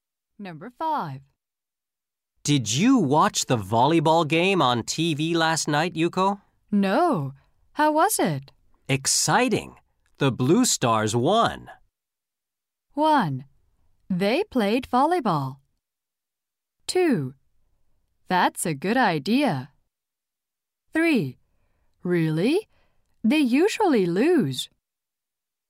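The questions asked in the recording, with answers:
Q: Exciting. The Blue Stars won.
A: 3: Really? They usually lose.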